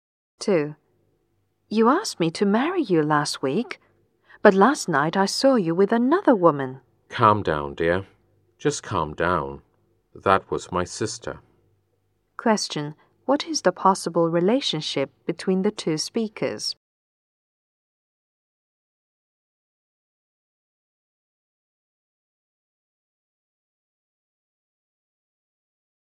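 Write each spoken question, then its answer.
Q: What is the possible relationship between the 2 speakers?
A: Lovers (he proposed to her)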